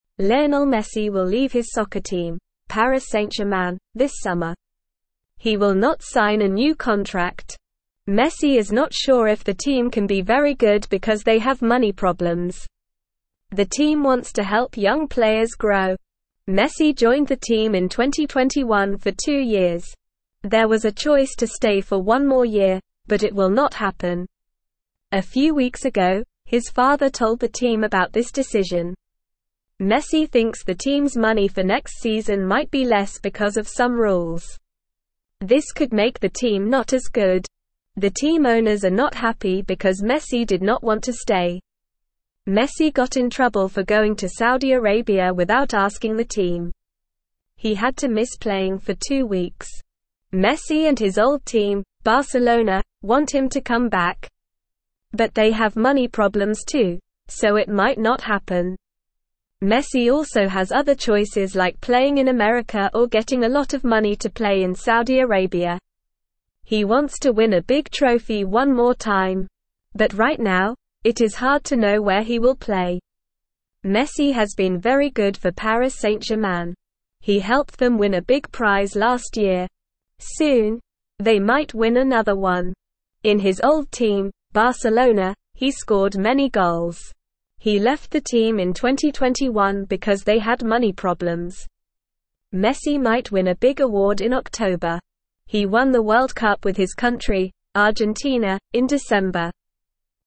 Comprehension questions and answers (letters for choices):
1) Why is Messi not signing a new contract?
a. He wants to play in America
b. He thinks the team has money problems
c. He wants to play for Barcelona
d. He wants to play in Saudi Arabia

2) When did Messi join Paris St-Germain?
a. 2020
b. 2021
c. 2019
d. 2018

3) What did Messi's father tell the team a few weeks ago?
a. Messi wants more money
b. Messi wants to play in America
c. Messi will not stay for another year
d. Messi wants to play in Saudi Arabia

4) Where did Messi go without asking the team?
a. America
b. Argentina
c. Spain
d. Saudi Arabia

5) What team does Messi want to come back to?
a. Argentina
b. Paris St-Germain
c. Barcelona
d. Saudi Arabia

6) What did Messi win with Argentina in December?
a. The World Cup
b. A big trophy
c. A big award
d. A new contract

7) Lionel Messi will leave his soccer team, (1)________, this summer.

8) Messi thinks the team's money for next season might be less because of some (2)________.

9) Messi got in trouble for going to (3)________ without asking the team.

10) Messi and his old team, (4)________, want him to come back.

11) Messi also has other choices like playing in (5)________ or getting a lot of money to play in Saudi Arabia.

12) Messi might win a big award in (6)________.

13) He won the World Cup with his country, (7)________, in December.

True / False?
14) Messi will leave his soccer team this summer.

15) Messi joined the team in 2020.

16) Messi's father told the team about the decision.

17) Messi went to Saudi Arabia with the team's permission.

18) Messi and Barcelona want him to come back.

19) Why is Messi not sure if the team can be very good?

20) When did Messi join the team?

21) What happened a few weeks ago with Messi's father?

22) What did Messi do that got him in trouble?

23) What are some other choices for Messi to play?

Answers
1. b
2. b
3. c
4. d
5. c
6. a
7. Paris St-Germain
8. rules
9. Saudi Arabia
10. Barcelona
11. America
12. October
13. Argentina
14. True
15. False
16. True
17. False
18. True
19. Messi is not sure because they have money problems.
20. Messi joined the team in 2021.
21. Messi's father told the team about Messi's decision to leave.
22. Messi went to Saudi Arabia without asking the team.
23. Messi can play in America or get a lot of money to play in Saudi Arabia.

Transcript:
Lionel Messi will leave his soccer team, Paris St-Germain, this summer. He will not sign a new contract. Messi is not sure if the team can be very good because they have money problems. The team wants to help young players grow.
Messi joined the team in 2021 for two years. There was a choice to stay for one more year, but it will not happen. A few weeks ago, his father told the team about this decision.
Messi thinks the team's money for next season might be less because of some rules. This could make the team not as good. The team owners are not happy because Messi did not want to stay.
Messi got in trouble for going to Saudi Arabia without asking the team. He had to miss playing for two weeks. Messi and his old team, Barcelona, want him to come back. But they have money problems too, so it might not happen.
Messi also has other choices like playing in America or getting a lot of money to play in Saudi Arabia. He wants to win a big trophy one more time. But right now, it is hard to know where he will play.
Messi has been very good for Paris St-Germain. He helped them win a big prize last year. Soon, they might win another one. In his old team, Barcelona, he scored many goals. He left the team in 2021 because they had money problems.
Messi might win a big award in October. He won the World Cup with his country, Argentina, in December.

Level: Level 1